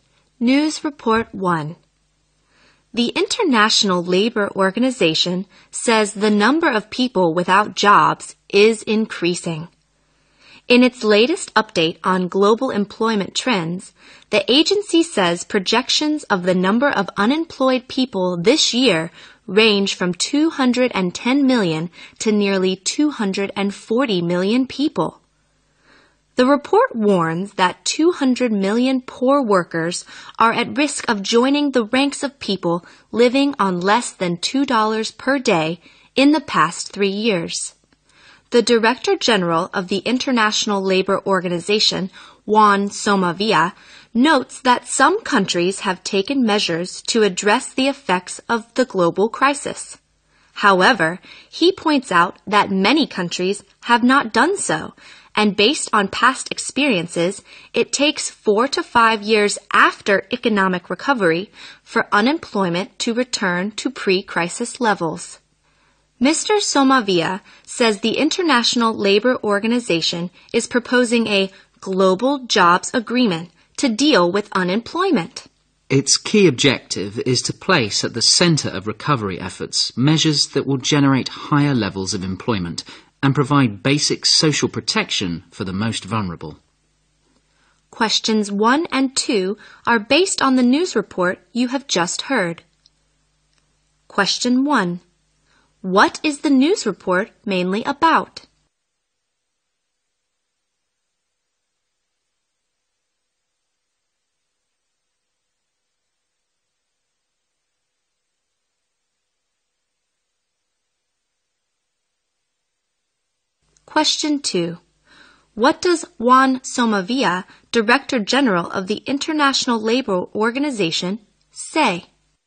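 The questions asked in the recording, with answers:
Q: What is the news report mainly about?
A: The number of unemployed people worldwide is increasing.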